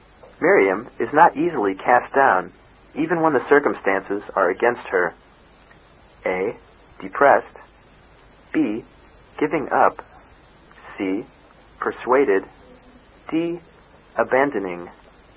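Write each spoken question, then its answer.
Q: Miriam is not easily cast down, even when the circumstances are against her.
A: A: Depressed.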